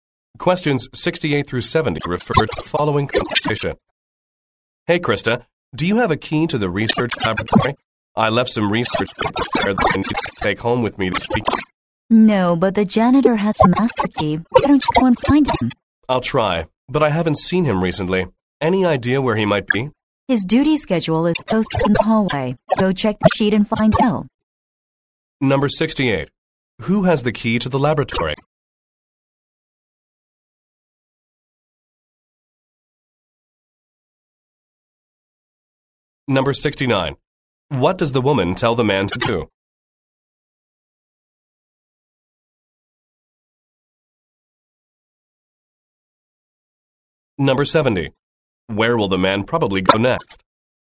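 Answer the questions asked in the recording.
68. The janitor
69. Find the janitor
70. The hallway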